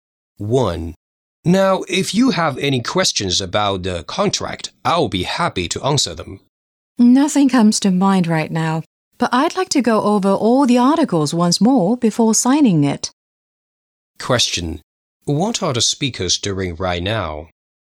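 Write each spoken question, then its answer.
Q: What are the speakers doing right now?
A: Discussing a contract before signing it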